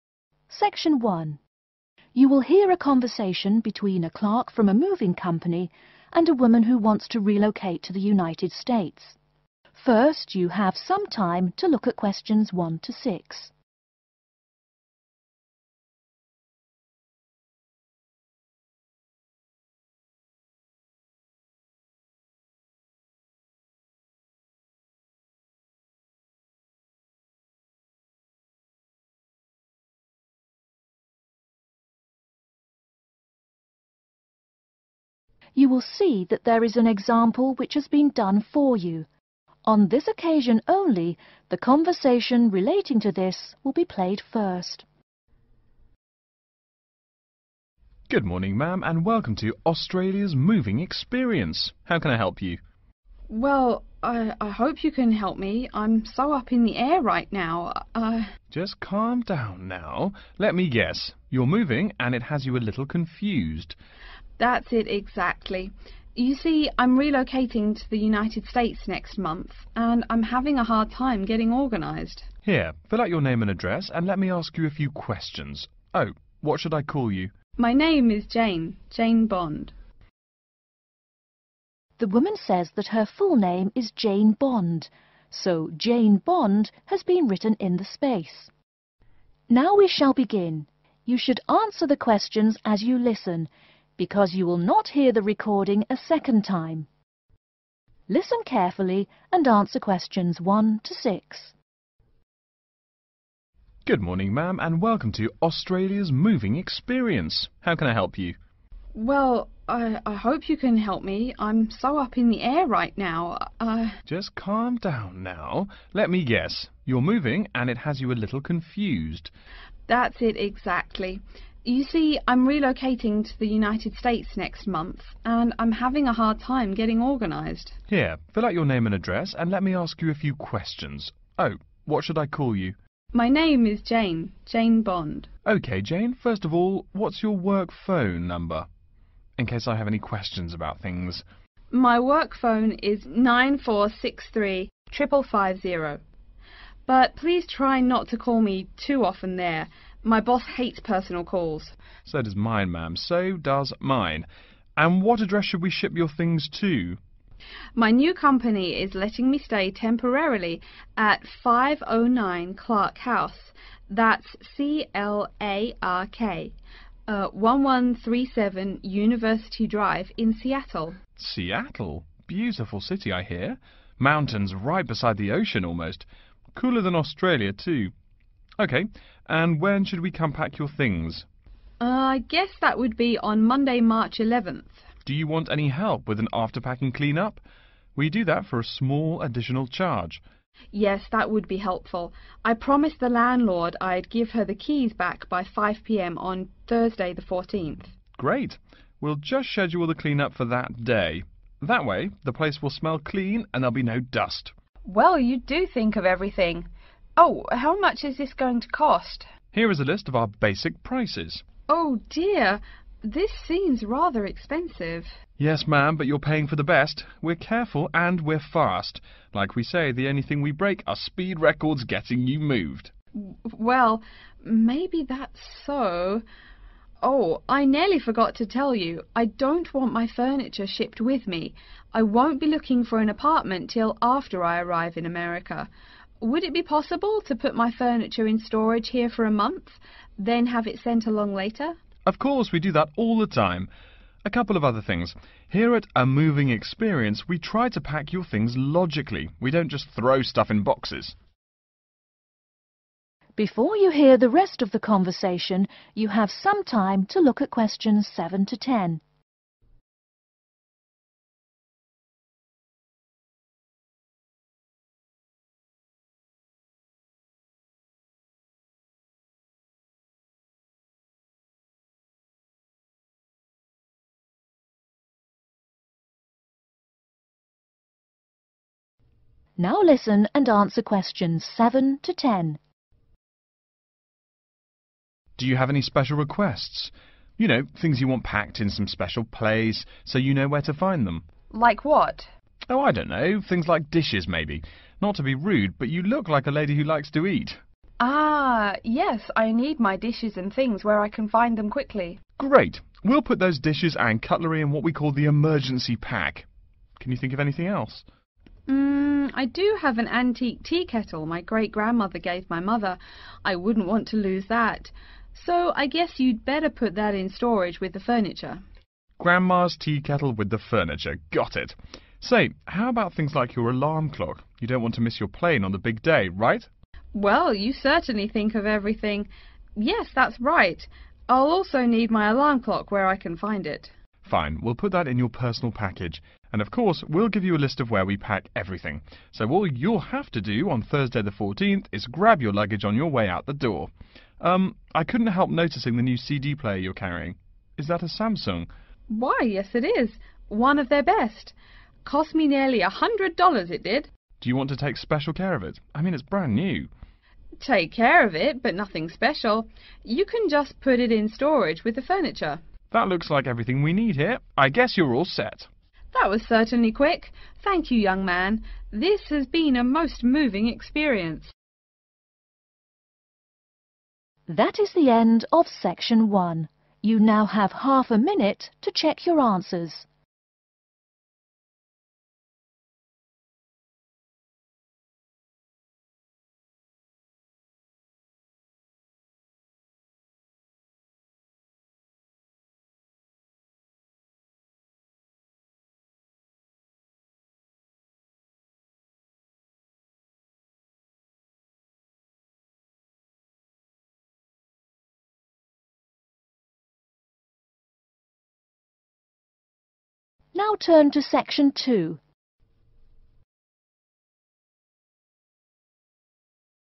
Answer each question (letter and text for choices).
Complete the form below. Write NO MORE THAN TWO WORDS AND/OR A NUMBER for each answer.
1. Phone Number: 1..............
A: 94635550

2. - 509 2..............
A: Clark House

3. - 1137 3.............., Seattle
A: University Drive

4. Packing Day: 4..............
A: Monday

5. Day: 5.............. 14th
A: Thursday

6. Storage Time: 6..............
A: a month

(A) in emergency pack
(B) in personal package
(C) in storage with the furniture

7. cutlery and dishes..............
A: (A) in emergency pack

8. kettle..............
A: (C) in storage with the furniture

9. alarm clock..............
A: (B) in personal package

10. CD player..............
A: (C) in storage with the furniture